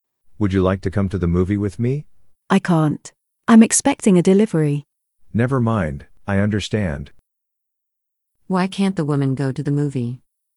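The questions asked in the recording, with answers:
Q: Why can't the woman go to the movie?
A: She's expecting a delivery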